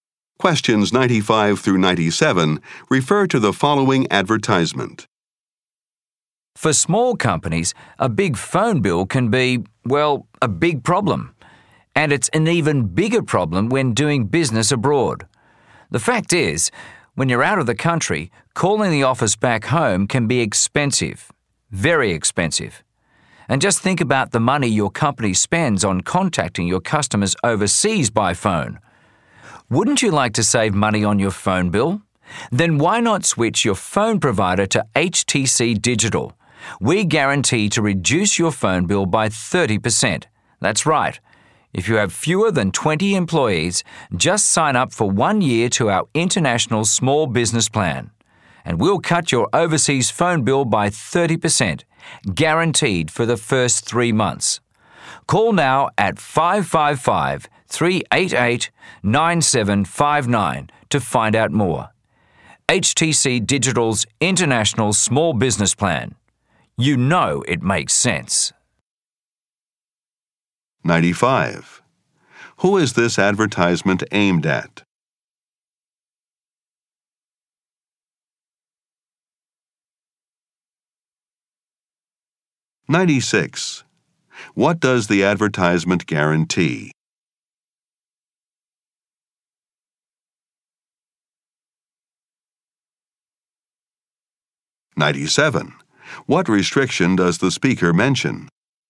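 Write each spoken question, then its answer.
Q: Who is this advertisement aimed at?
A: Small companies

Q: What does the advertisement guarantee?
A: A 30% cut in overseas phone bills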